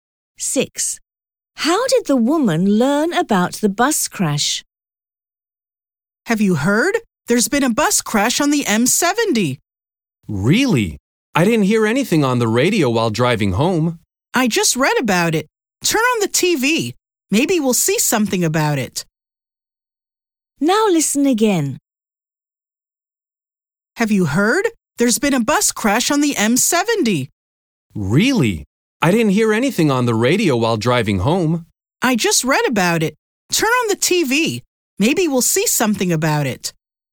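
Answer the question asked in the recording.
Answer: She read about it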